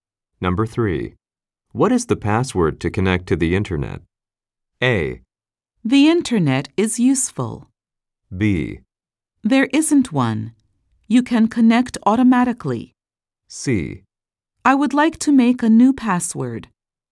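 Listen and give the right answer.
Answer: B: There isn't one. You can connect automatically.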